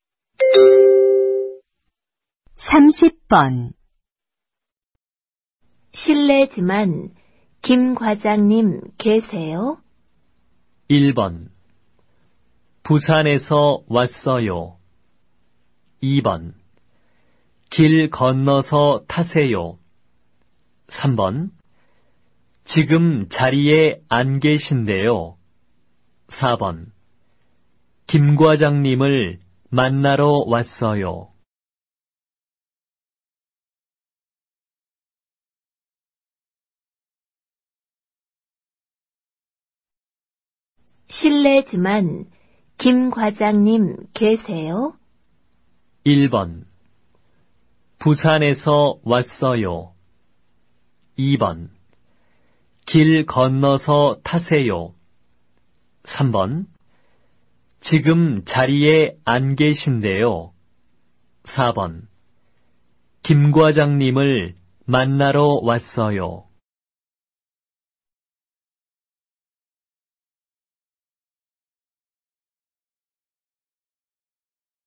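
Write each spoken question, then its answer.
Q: 실례지만 김 과장님 계세요?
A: 3: 지금 자리에 안 계신데요.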